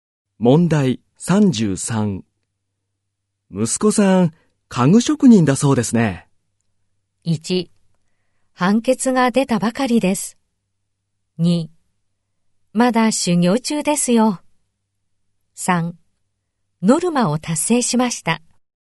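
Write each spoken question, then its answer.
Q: 息子さん家具職人だそうですね。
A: 2: まだ修行中ですよ。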